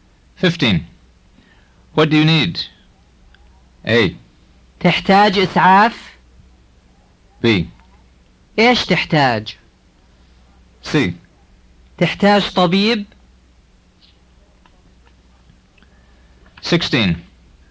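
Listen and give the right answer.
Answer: B: إيش تحتاج؟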